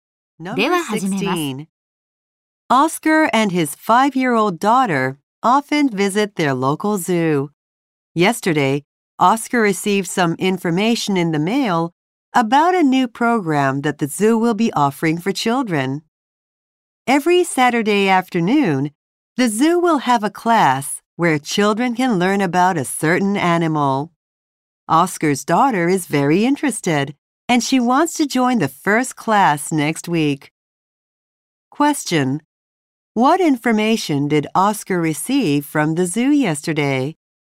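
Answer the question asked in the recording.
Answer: Information about a new Saturday class for children about animals.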